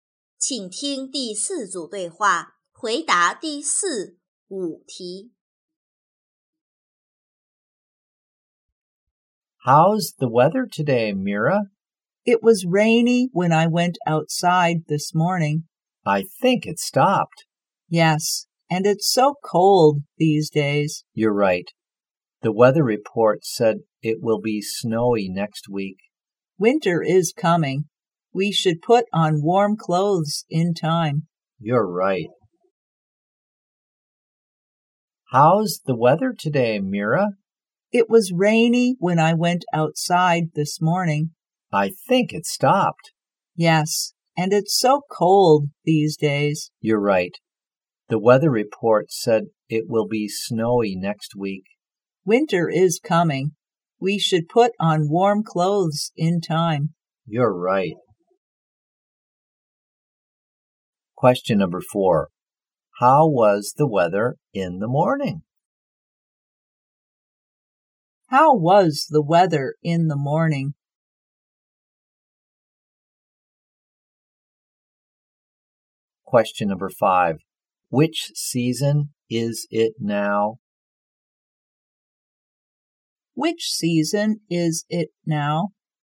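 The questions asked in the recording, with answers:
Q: How was the weather in the morning?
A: Rainy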